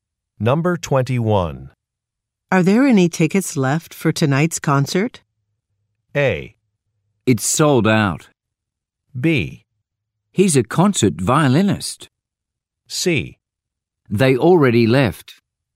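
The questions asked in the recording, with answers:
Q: Are there any tickets left for tonight's concert?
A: A: It's sold out.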